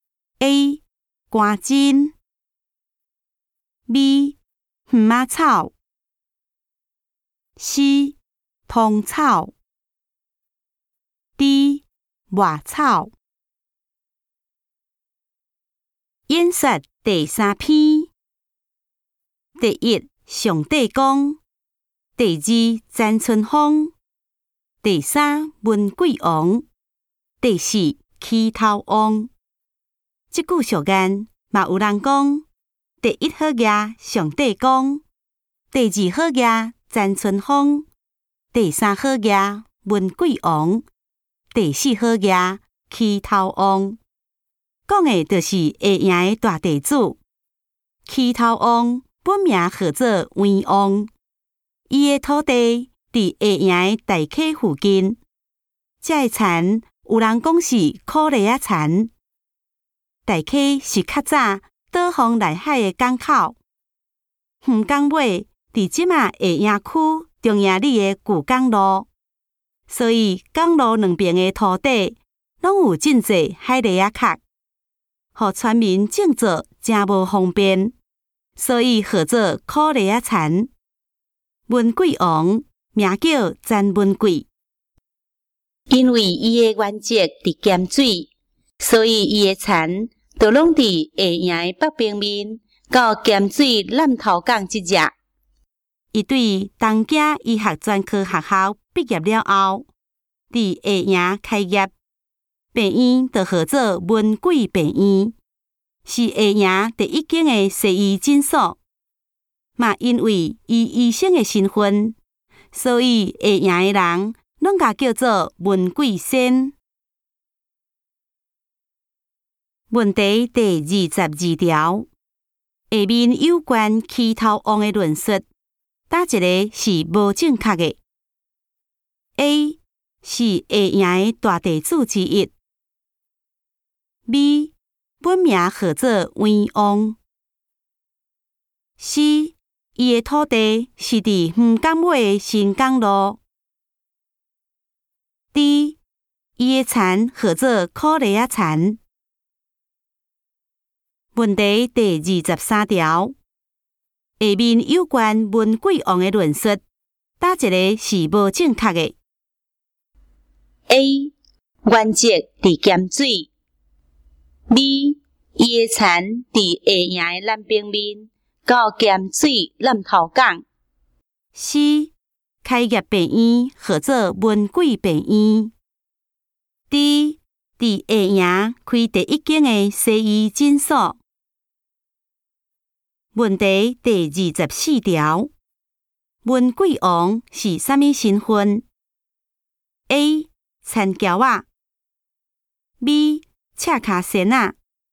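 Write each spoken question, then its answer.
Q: 下面有关文贵王的论述,哪一个是无正确的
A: B: 伊的田伫下营的南平面,到咸水南头港。

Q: 文贵王是啥物身份 ?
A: C: 大夫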